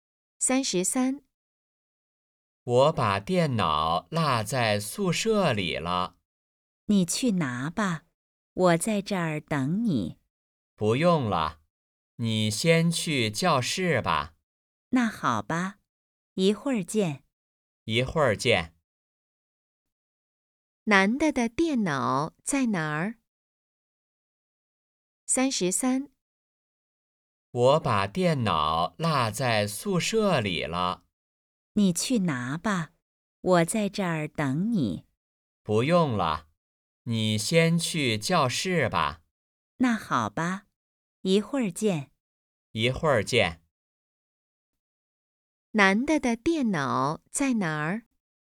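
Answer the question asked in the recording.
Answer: 宿舍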